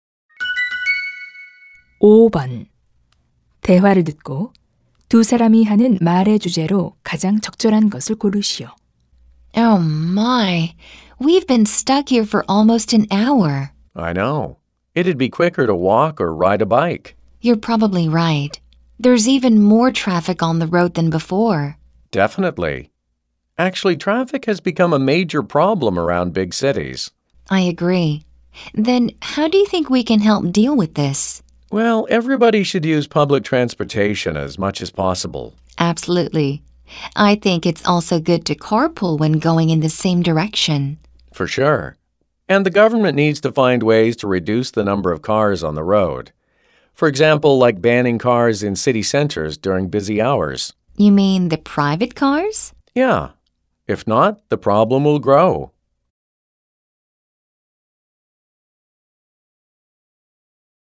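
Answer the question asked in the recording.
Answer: 교통 체증 문제의 해결 방안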